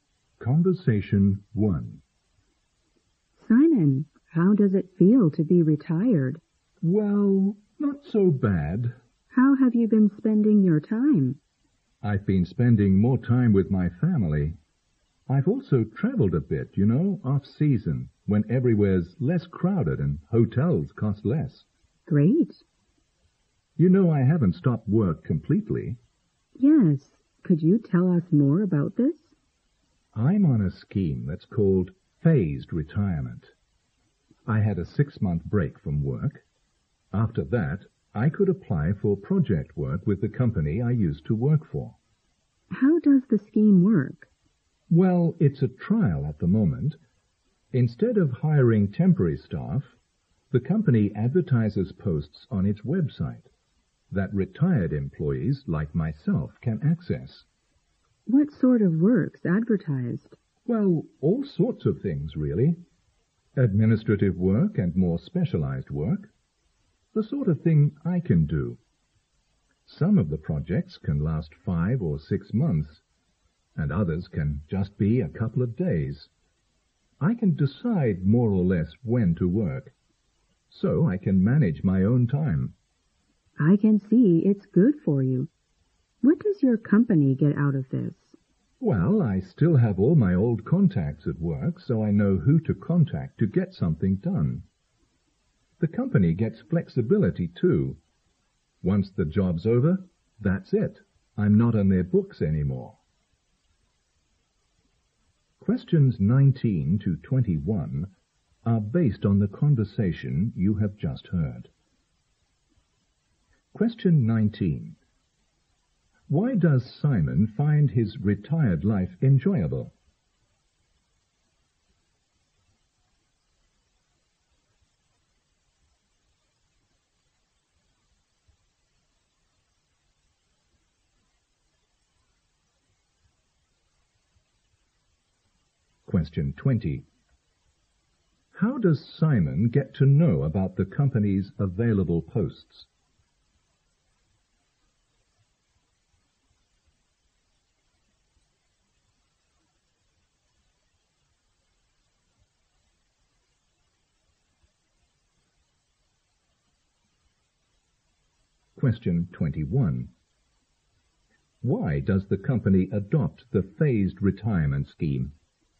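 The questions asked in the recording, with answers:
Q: How does Simon get to know about the company's available posts?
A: From the company's website

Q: Why does the company adopt the phased retirement scheme?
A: It gets flexibility and experienced staff with contacts, instead of hiring temporary staff.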